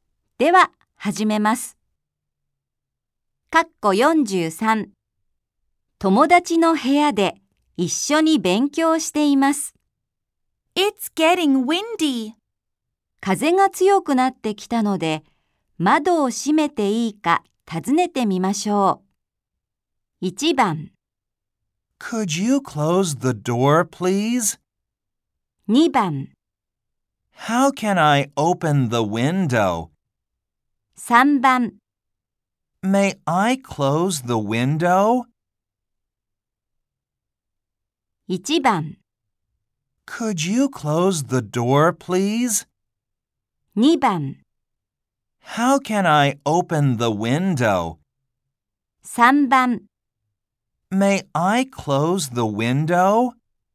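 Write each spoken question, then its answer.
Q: 風が強くなってきたので、窓を閉めていいか尋ねてみましょう。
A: 3: May I close the window?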